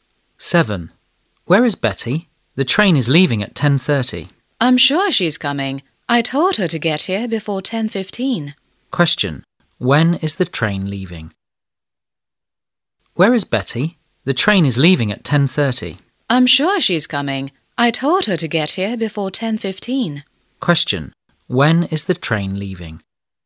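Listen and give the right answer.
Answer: At 10:30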